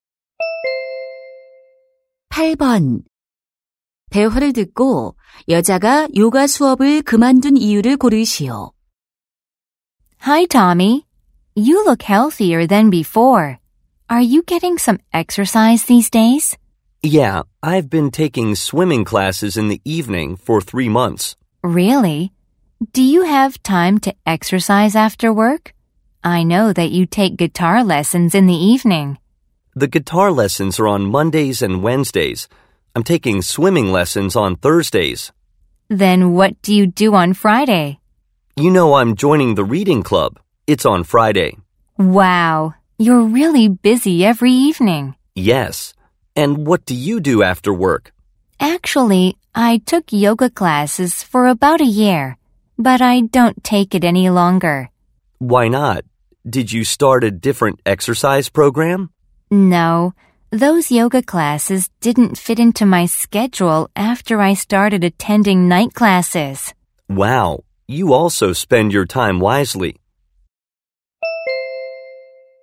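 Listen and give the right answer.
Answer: 야간 수업을 듣기 시작해서 일정이 맞지 않아서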